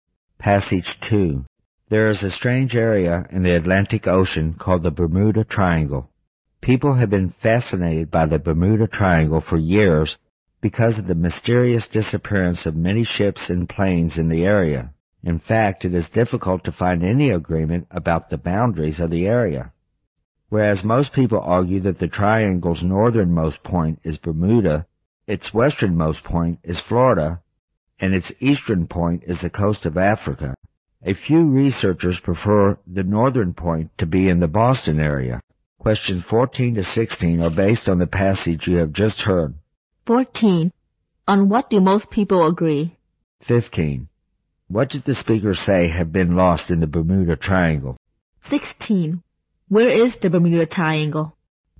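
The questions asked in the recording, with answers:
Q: What did the speaker say had been lost in the Bermuda Triangle?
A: Many ships and planes

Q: Where is the Bermuda Triangle?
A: In the Atlantic Ocean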